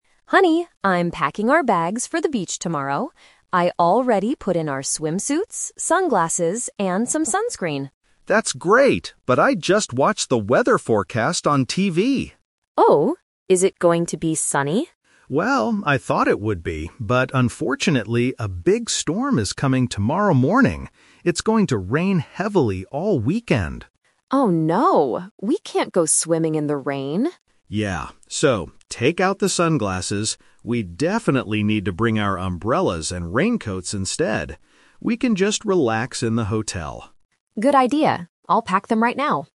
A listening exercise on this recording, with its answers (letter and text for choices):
Listen to the conversation and choose the correct answer (A, B, or C).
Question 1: What did the wife initially pack for the trip?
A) Umbrellas and raincoats.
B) Swimsuits and sunglasses.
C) Thick coats and hats.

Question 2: What is the weather forecast for tomorrow?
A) Sunny and hot.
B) Cloudy and windy.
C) Rainy and stormy.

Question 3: What will they bring for their trip in the end?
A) Swimsuits and sunscreen.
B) Umbrellas and raincoats.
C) Only their sunglasses.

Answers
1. B) Swimsuits and sunglasses.
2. C) Rainy and stormy.
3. B) Umbrellas and raincoats.

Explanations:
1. The wife says at the beginning, "I already put in our swimsuits, sunglasses..." Option (A) is the trap because these are the items they decide to pack at the end of the conversation. Option (C) is plausible for packing but is never mentioned in the audio.
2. The husband says, "...a big storm is coming tomorrow morning. It's going to rain heavily all weekend." Option (A) is the trap; it is what they hoped the weather would be for a beach trip. Option (B) is not mentioned.
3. Because of the rain, the husband says, "We definitely need to bring our umbrellas and raincoats instead." The wife agrees ("Good idea. I'll pack them right now"). Option (A) and (C) are traps because they were part of the initial plan (Plan A) before the husband checked the weather.

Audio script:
Wife: Honey, I'm packing our bags for the beach tomorrow. I already put in our swimsuits, sunglasses, and some sunscreen.
Husband: That's great, but I just watched the weather forecast on TV.
Wife: Oh? Is it going to be sunny?
Husband: Well, I thought it would be, but unfortunately, a big storm is coming tomorrow morning. It's going to rain heavily all weekend.
Wife: Oh no! We can't go swimming in the rain.
Husband: Yeah. So, take out the sunglasses. We definitely need to bring our umbrellas and raincoats instead.